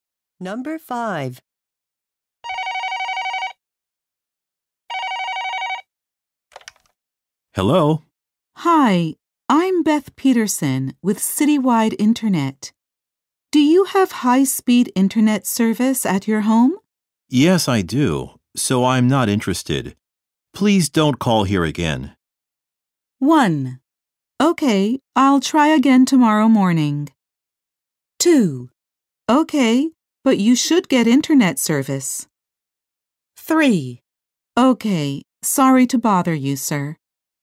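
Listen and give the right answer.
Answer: 3: Okay, sorry to bother you, sir.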